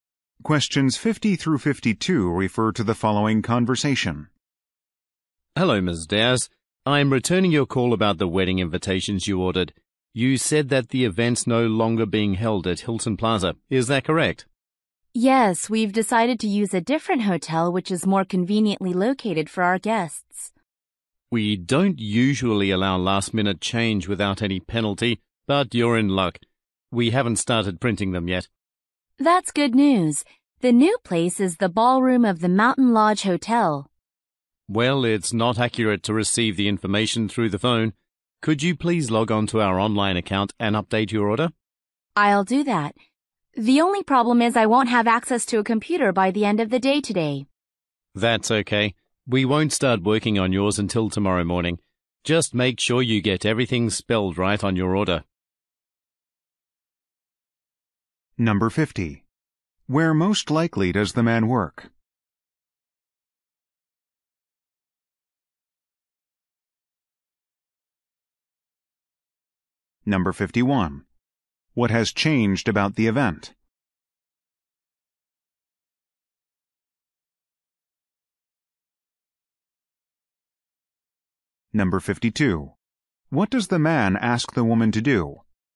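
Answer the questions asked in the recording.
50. At a printing company
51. The venue
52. Update her order online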